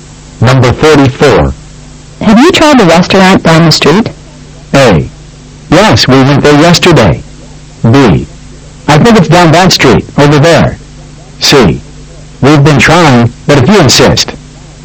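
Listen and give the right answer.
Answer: A: Yes, we went there yesterday.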